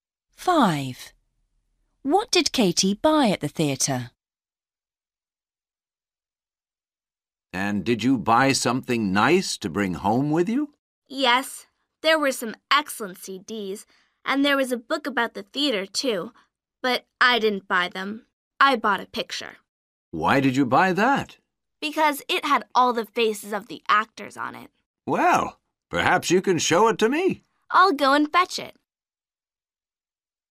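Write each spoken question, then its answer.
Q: What did Katie buy at the theater?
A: A picture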